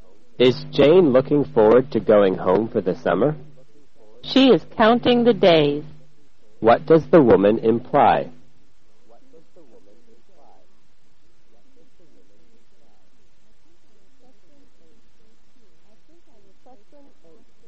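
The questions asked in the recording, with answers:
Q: What does the woman imply?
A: Jane is very eager to go home for the summer.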